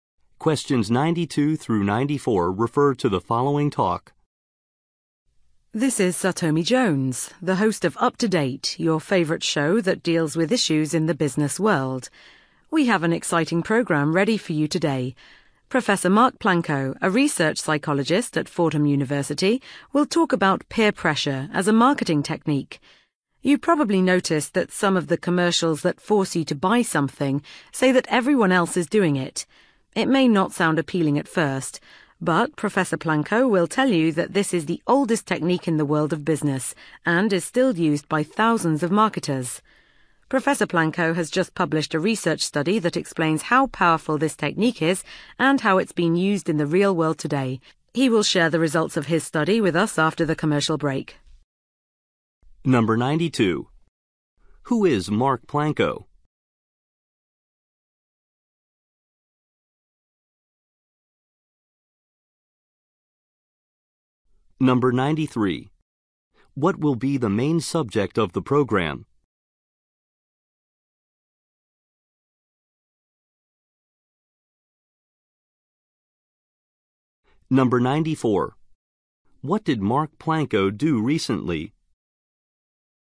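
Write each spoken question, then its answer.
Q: Who is Mark Planko?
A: A research psychologist at Fordham University

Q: What will be the main subject of the program?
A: Peer pressure as a marketing technique

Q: What did Mark Planko do recently?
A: Published a research study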